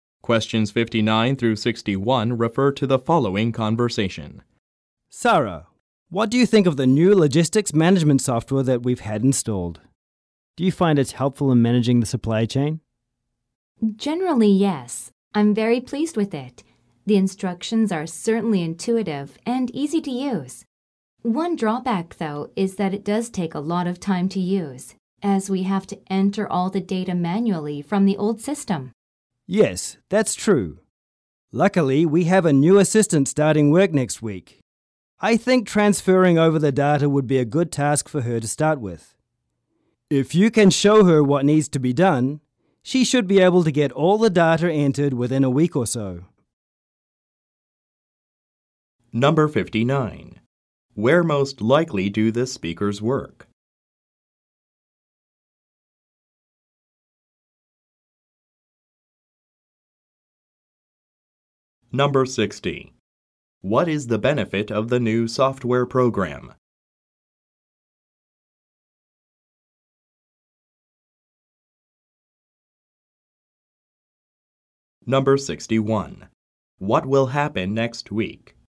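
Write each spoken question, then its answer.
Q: What is the benefit of the new software program?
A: It is intuitive and easy to use

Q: What will happen next week?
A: A new assistant will start work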